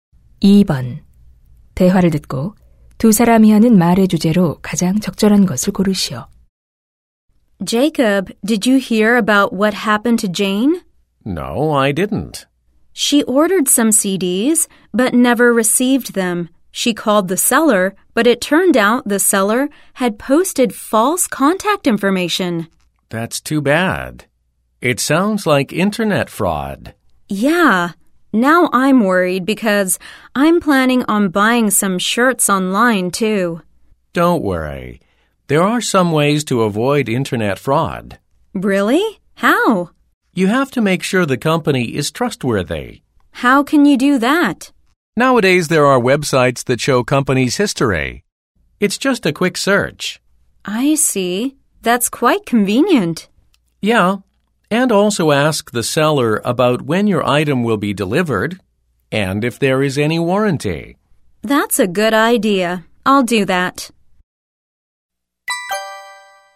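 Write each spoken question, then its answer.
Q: 대화를 듣고 두 사람이 하는 말의 주제로 가장 적절한 것을 고르시오.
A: 인터넷 사기를 피하는 방법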